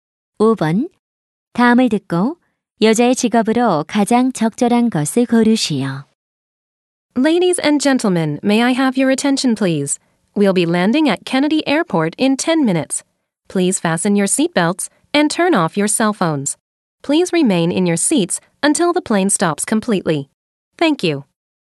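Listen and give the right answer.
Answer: 승무원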